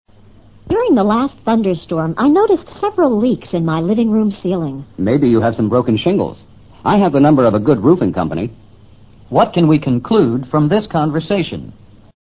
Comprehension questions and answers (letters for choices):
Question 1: What can we conclude from this conversation?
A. The woman is afraid of thunderstorms.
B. The man works for a roofing company.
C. The roof of the woman's house needs repair.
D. The man's roof is leaking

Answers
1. C

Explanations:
several leaks (漏水)in my living room ceiling 提供的信息可以判断C可能是正确答案。I have the number (电话号码) of a good roofing company 提供的信息可排除B的可能性。如是B,他应说I have the number of my company。D与他的说话内容无关。Shingle : 木片瓦。